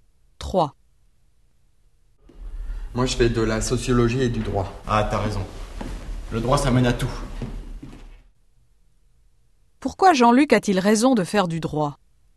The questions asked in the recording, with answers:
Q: Pourquoi Jean-Luc a-t-il raison de faire du droit?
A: Parce que ça mène à tout.